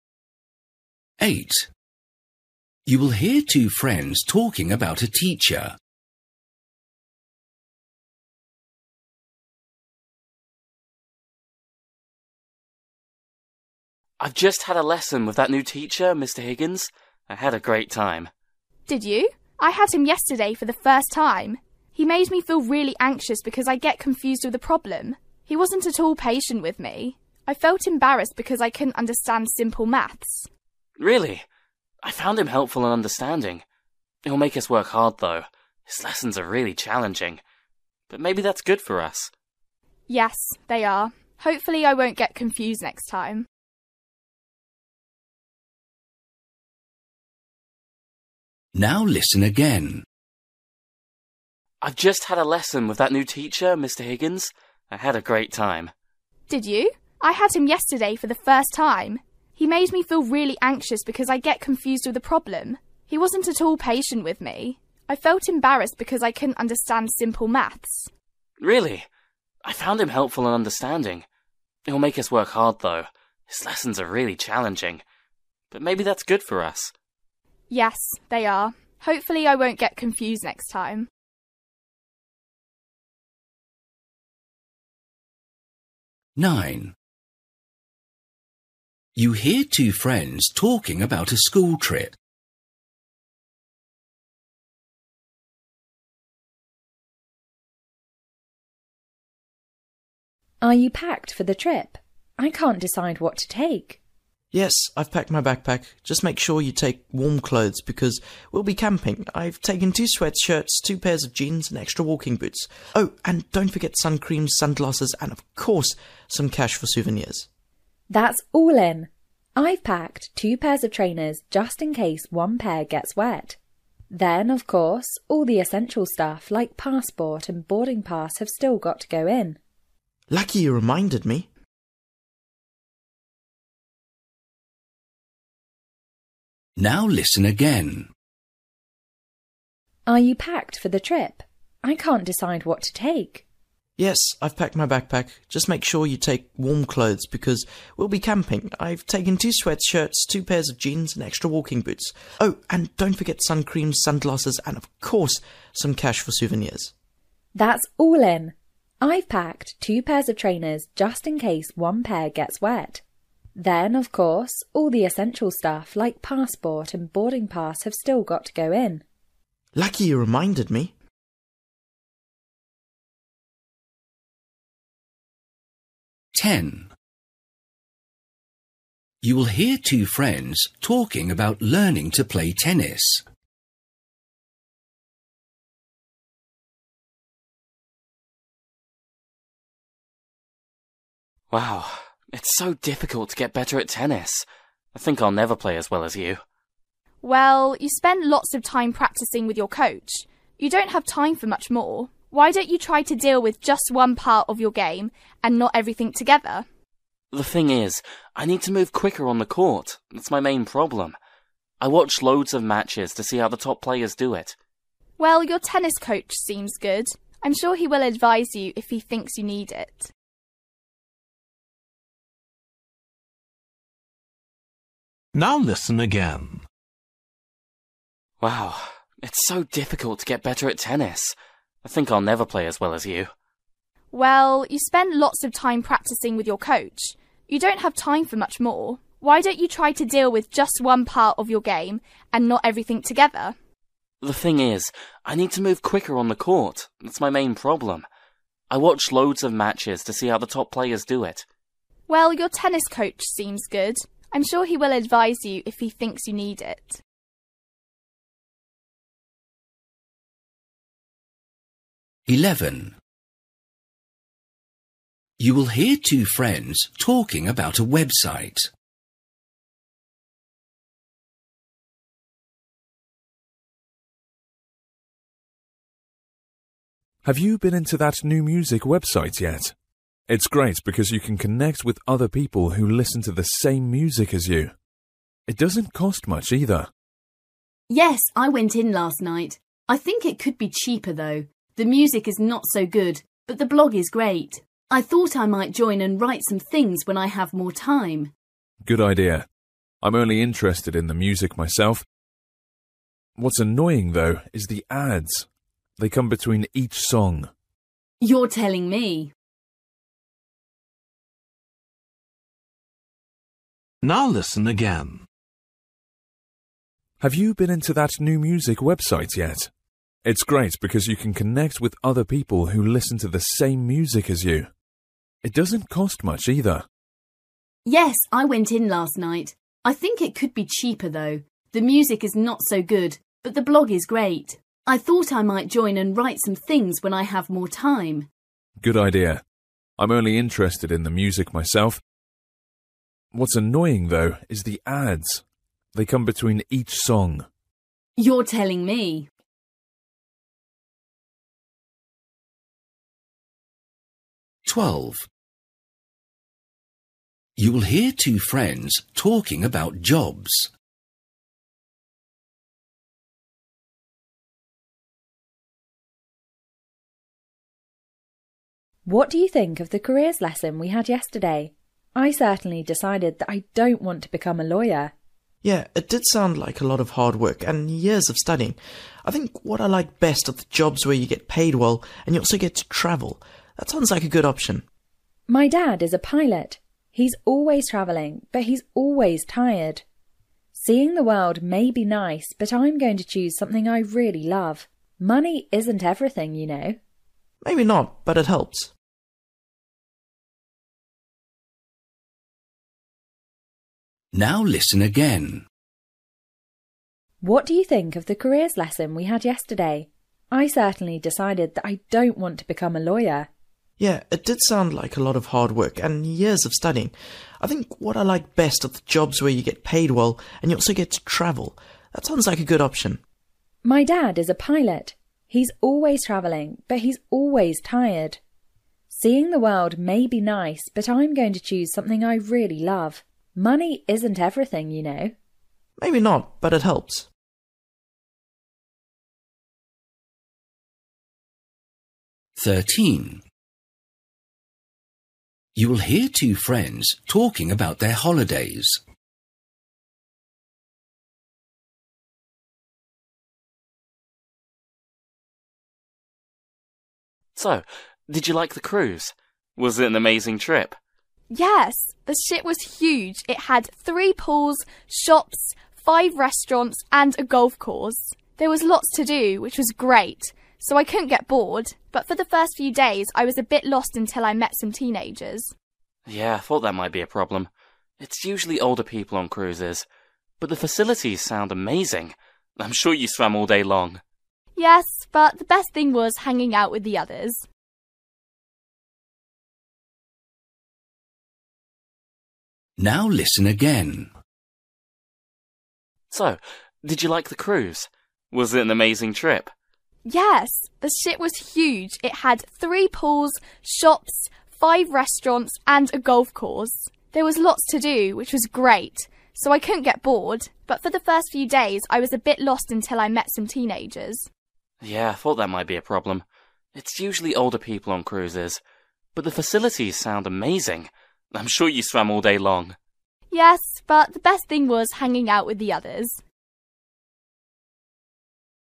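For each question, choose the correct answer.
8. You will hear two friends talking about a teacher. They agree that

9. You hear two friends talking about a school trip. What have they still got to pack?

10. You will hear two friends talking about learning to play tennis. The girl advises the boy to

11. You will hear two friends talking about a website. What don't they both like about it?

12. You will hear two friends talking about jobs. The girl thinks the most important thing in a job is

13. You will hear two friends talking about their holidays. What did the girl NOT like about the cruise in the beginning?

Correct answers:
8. his lessons are challenging
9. passport and boarding pass
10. deal with just one part of his game at a time
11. the ads between songs
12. doing something you really love
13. she felt lost until she met other teenagers

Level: Luyện nghe trình độ B1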